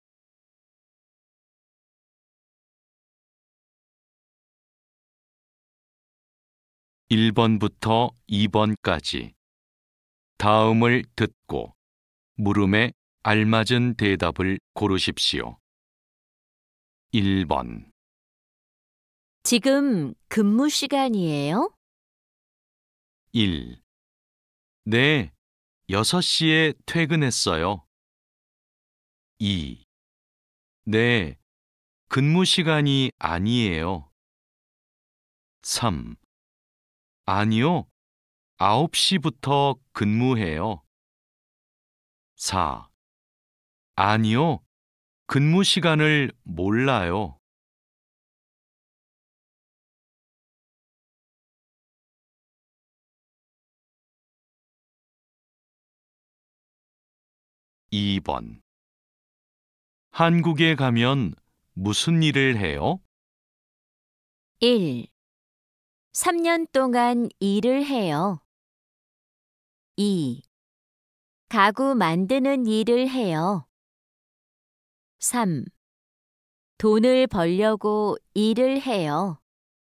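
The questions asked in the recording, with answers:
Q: 지금 근무 시간이에요?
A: 3: 아니요, 9시부터 근무해요.

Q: 한국에 가면 무슨 일을 해요?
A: 2: 가구 만드는 일을 해요.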